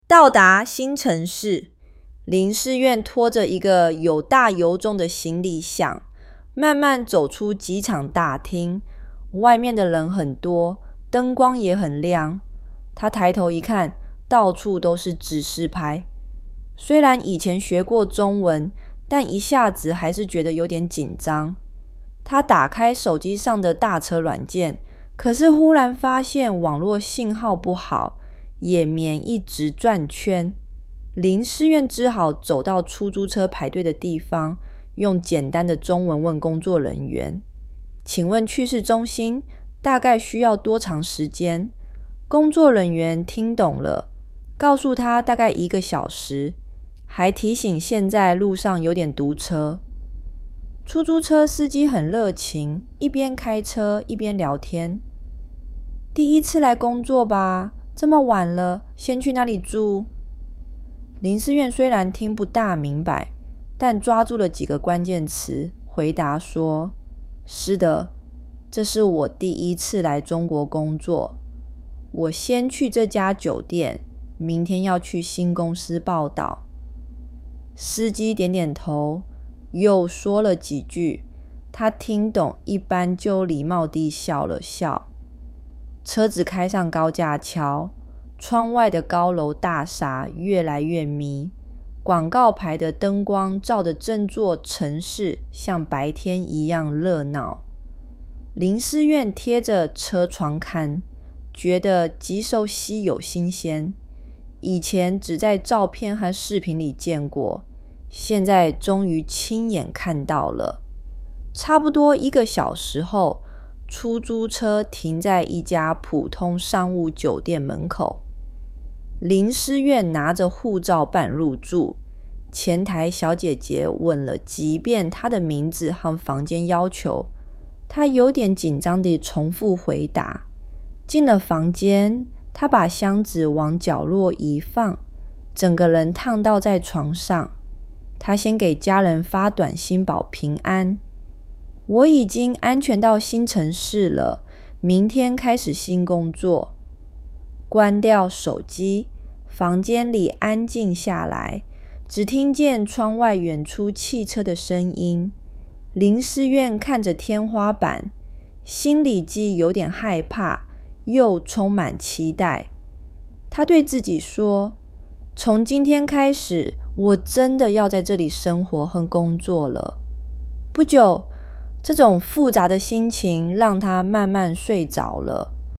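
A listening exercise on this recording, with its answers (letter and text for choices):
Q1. 他为什么没用打车软件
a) 网络信号不好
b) 手机没电了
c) 软件太贵了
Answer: a) 网络信号不好

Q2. 去市中心要多久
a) 三十分钟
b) 大概一个小时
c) 两个小时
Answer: b) 大概一个小时

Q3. 司机怎么形容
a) 安静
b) 严肃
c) 热情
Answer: c) 热情

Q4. 林思远办入住用了什么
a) 护照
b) 身份证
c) 工牌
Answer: a) 护照

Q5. 他对自己说了什么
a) 我明天就回家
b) 从今天开始,我真的要在这里生活和工作了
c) 这个城市太吵了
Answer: b) 从今天开始,我真的要在这里生活和工作了

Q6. 他最后怎么了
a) 看了电视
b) 打了电话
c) 慢慢睡着了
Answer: c) 慢慢睡着了

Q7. 林思远从哪里走出来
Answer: 机场大厅

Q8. 他为什么没有用打车软件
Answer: 网络信号不好

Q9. 去市中心大概需要多长时间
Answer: 大概一个小时

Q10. 出租车司机问了什么问题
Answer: 第一次来工作吧?这么晚了,先去哪里住?

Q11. 林思远明天要去哪里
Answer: 去新公司报到

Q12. 车窗外的城市是什么样子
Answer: 高楼大厦很密,灯光让城市像白天一样热闹

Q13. 他办入住用什么证件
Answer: 护照

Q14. 进房间后他做了什么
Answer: 把箱子放在角落,躺倒在床上

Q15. 他给家人发短信说了什么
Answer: 我已经安全到新城市了,明天开始新工作。

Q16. 林思远心里是什么感觉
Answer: 既有点害怕,又充满期待

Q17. 林思远拖着一个小行李箱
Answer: False

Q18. 打车软件正常使用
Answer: False

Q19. 路上有点堵车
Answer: True

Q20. 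林思远听懂了司机说的所有话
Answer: False

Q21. 车窗外的城市很暗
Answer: False

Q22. 林思远以前只在照片和视频里见过这个城市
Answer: True

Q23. 林思远住在高级酒店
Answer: False

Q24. 他给家人发短信报平安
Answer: True

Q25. 林思远心里只有害怕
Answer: False

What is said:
到达新城市
林思远拖着一个又大又重的行李箱,慢慢走出机场大厅。外面的人很多,灯光也很亮。他抬头一看,到处都是指示牌。虽然以前学过中文,但一下子还是觉得有点紧张
他打开手机上的打车软件,可是忽然发现网络信号不好,页面一直转圈。林思远只好走到出租车排队的地方,用简单的中文问工作人员:"请问去市中心,大概需要多长时间?"工作人员听懂了,告诉他大概一个小时,还提醒现在路上有点堵车
出租车司机热情,一边开车一边聊天:"第一次来工作吧?这么晚了,先去哪里住?"林思远虽然听不大明白,但抓住了几个关键词,回答说:"是的,这是我第一次来中国工作。我先去这家酒店,明天要去新公司报到。"司机点点头,又说了几句,他听懂一半就礼貌地笑了笑。
车子开上高架桥,窗外的高楼大厦越来越密,广告牌的灯光照得整座城市像白天一样热闹林思远贴着车窗看,觉得既熟悉又新鲜。以前只在照片和视频里见过,现在终于亲眼看到了。
差不多一个小时后,出租车停在一家普通商务酒店门口。林思远拿着护照入住,前台小姐姐问了几遍他的名字和房间要求,他有点紧张地重复回答。进了房间,他把箱子往角落一放,整个人躺倒在床上。
他先给家人发短信报平安:"我已经安全到新城市了,明天开始新工作。"关掉手机,房间里安静下来,只听见窗外远处汽车的声音。林思远看着天花板,心里既有点害怕,又充满期待。他对自己说:"从今天开始,我真的要在这里生活和工作了。"不久,这种复杂的心情让他慢慢睡着了。

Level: HSK4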